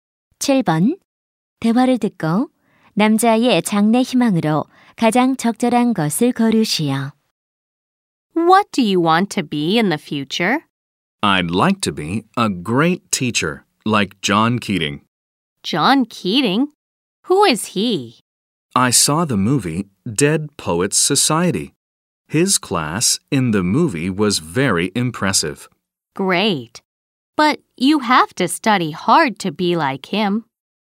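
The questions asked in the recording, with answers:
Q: 대화를 듣고 남자의 장래 희망으로 가장 적절한 것을 고르시오.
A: 교사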